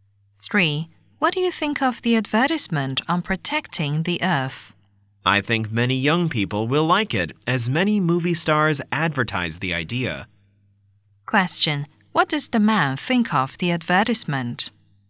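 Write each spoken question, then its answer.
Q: What does the man think of the advertisement?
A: Many young people will like it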